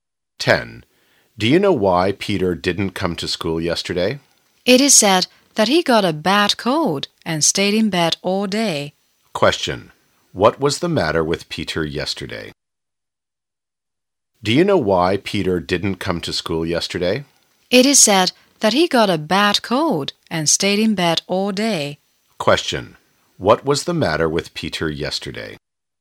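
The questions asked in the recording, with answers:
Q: What was the matter with Peter yesterday?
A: He had a bad cold.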